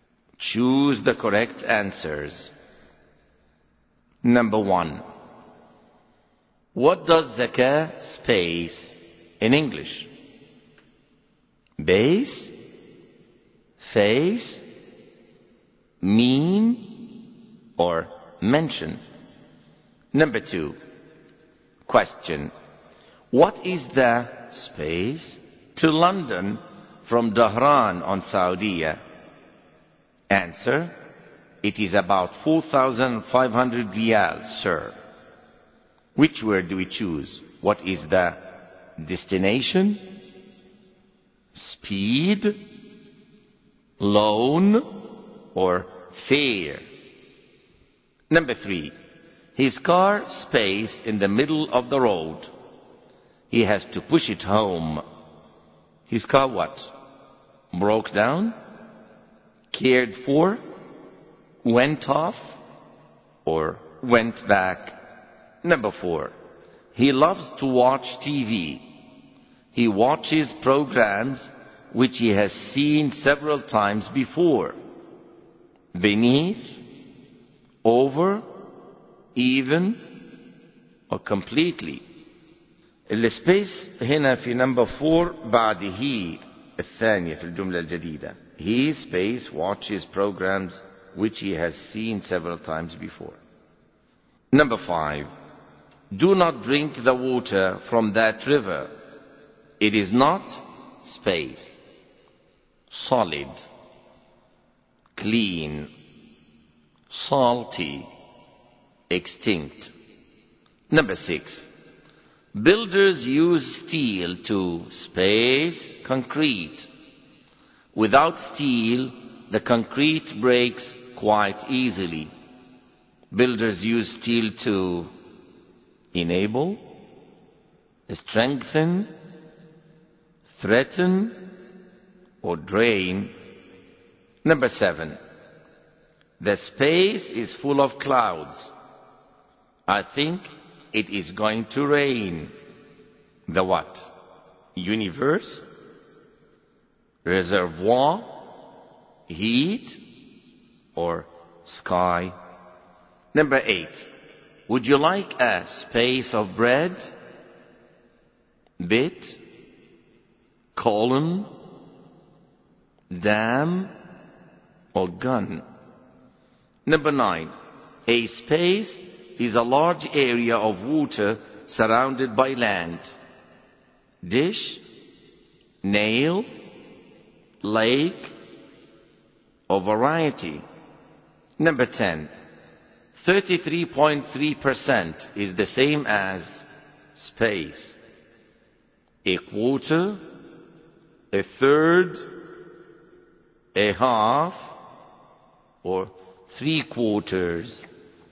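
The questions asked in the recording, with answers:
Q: What does zakah space in English?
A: C: mean

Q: What is the space to London from Dahran on Saudia?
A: D: fare

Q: His car space in the middle of the road. He has to push it home. His car what?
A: A: broke down

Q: He space watches programs which he has seen several times before.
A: C: even

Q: Do not drink the water from that river. It is not space.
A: B: clean

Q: Builders use steel to space concrete.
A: B: strengthen

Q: The space is full of clouds.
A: D: sky

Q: Would you like a space of bread?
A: A: bit

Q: A space is a large area of water surrounded by land.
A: C: lake

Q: 33.3% is the same as space.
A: B: a third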